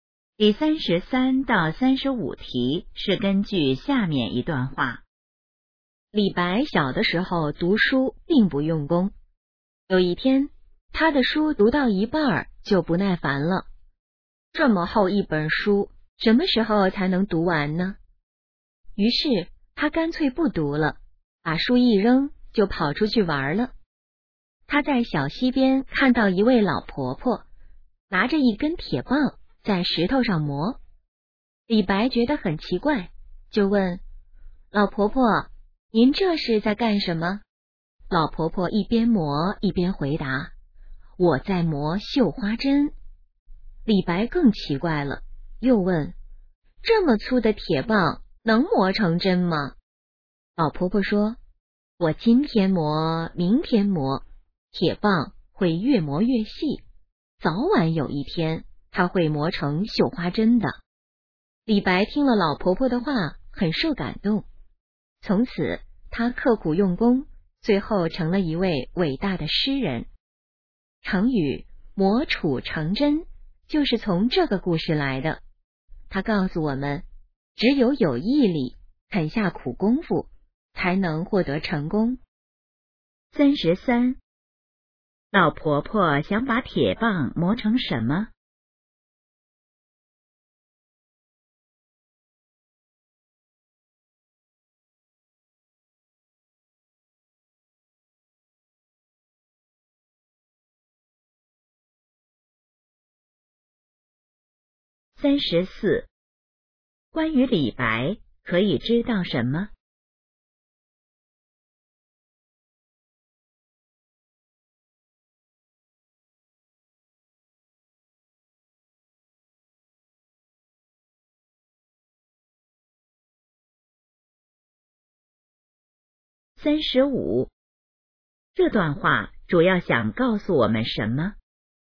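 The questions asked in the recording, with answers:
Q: 老婆婆想把铁棒磨成什么?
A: 绣花针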